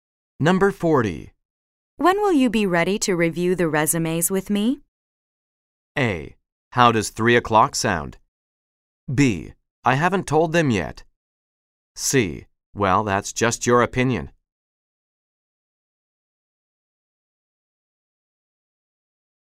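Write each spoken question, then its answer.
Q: When will you be ready to review the resumes with me?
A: A: How does 3 o'clock sound?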